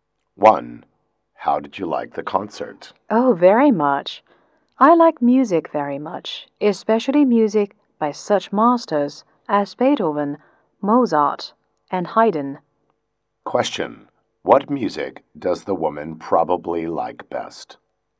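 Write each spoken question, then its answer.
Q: What music does the woman probably like best?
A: Classical music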